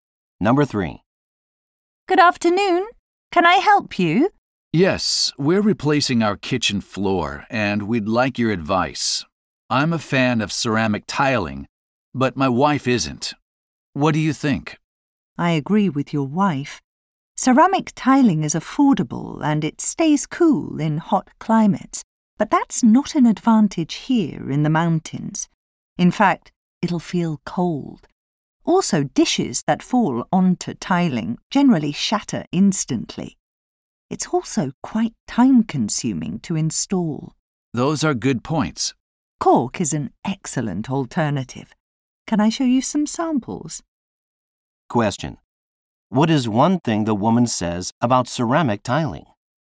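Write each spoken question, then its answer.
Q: What is one thing the woman says about ceramic tiling?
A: It will feel cold in the mountains (and dishes break on it)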